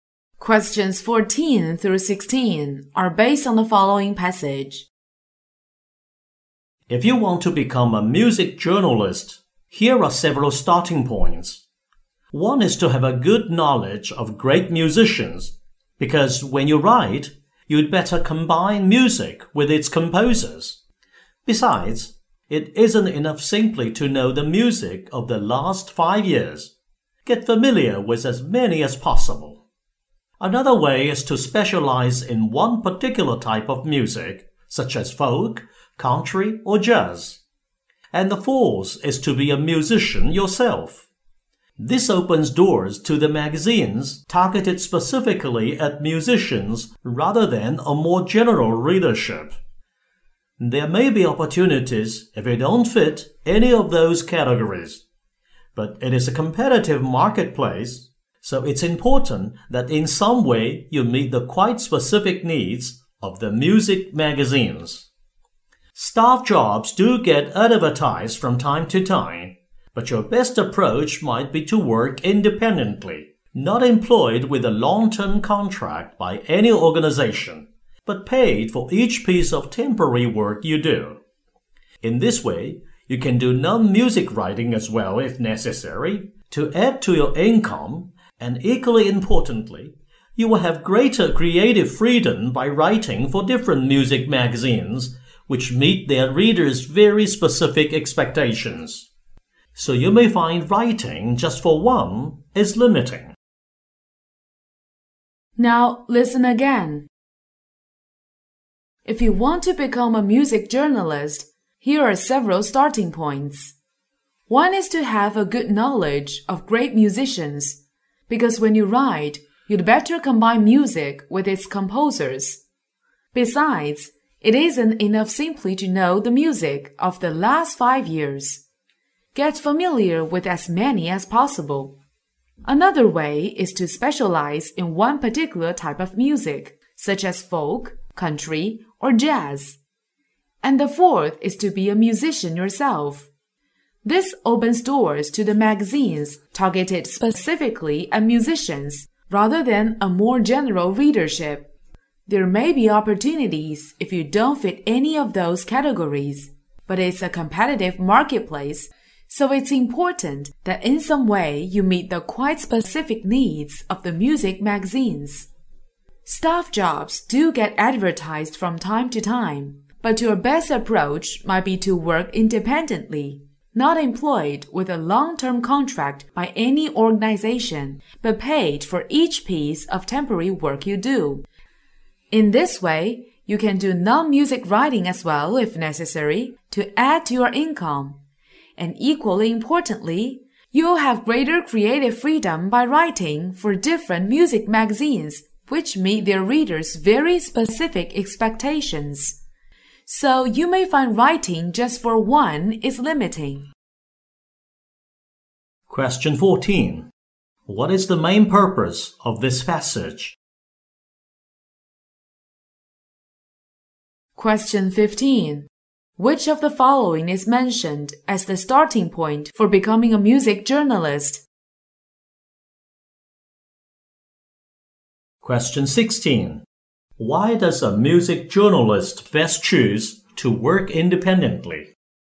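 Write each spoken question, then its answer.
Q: What is the main purpose of this passage?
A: To give advice on becoming a music journalist

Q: Why does a music journalist best choose to work independently?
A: To get more income and greater creative freedom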